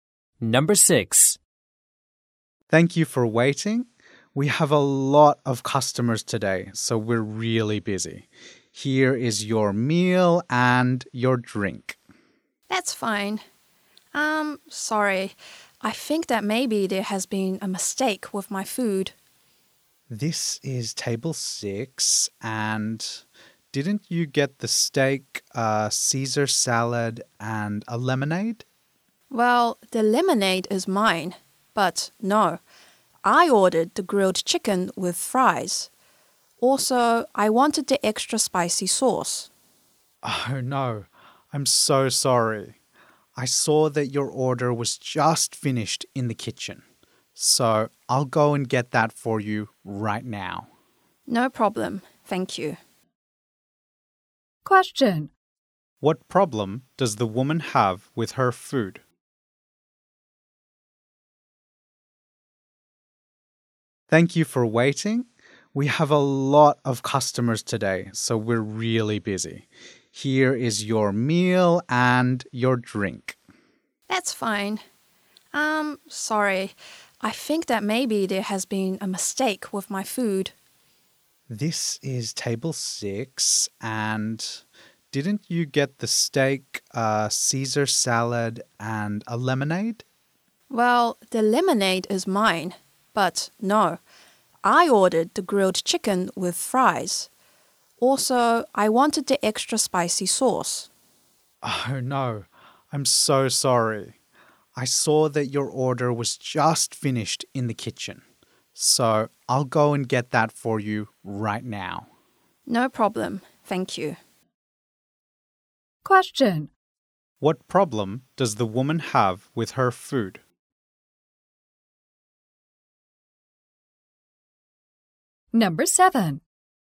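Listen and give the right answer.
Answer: She was given the wrong food: steak and a Caesar salad instead of the grilled chicken with fries she ordered.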